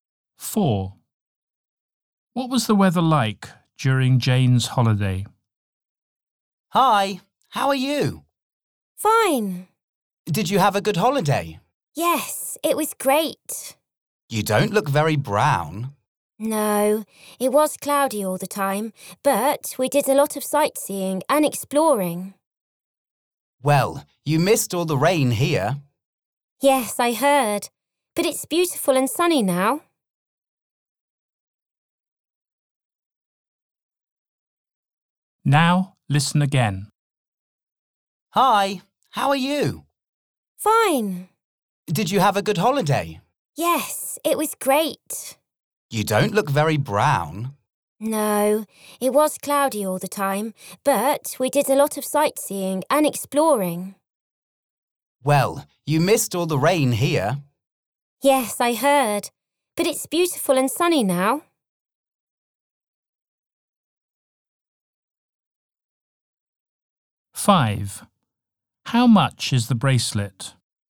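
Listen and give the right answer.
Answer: Cloudy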